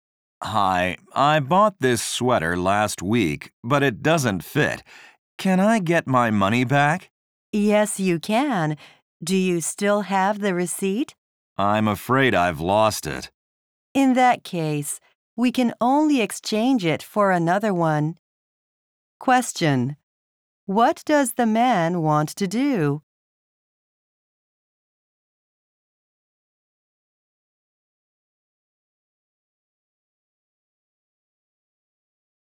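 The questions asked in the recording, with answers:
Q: What does the man want to do?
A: Return the sweater and get his money back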